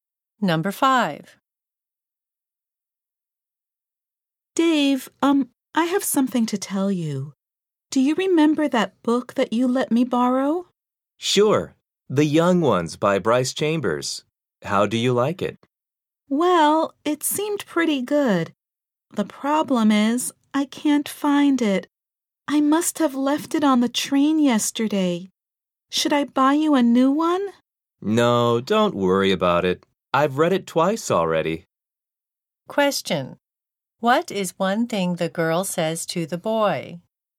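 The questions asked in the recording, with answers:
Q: What is one thing the girl says to the boy?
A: She lost his book, probably leaving it on the train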